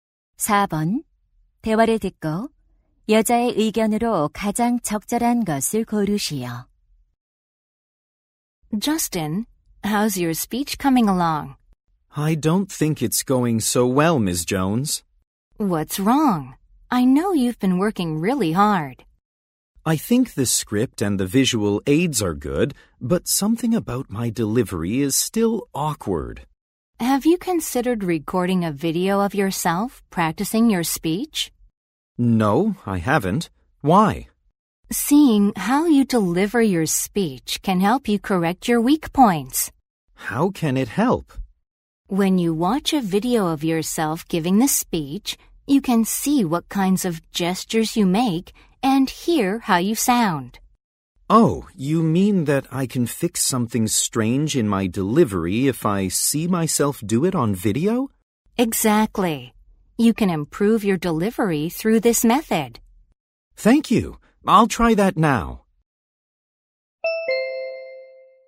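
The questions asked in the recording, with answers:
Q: 대화를 듣고 여자의 의견으로 가장 적절한 것을 고르시오.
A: 연설 연습을 녹화해 보면 전달력을 개선할 수 있다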